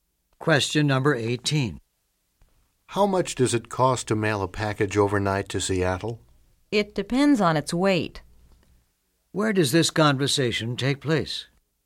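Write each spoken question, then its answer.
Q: Where does this conversation take place?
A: At a post office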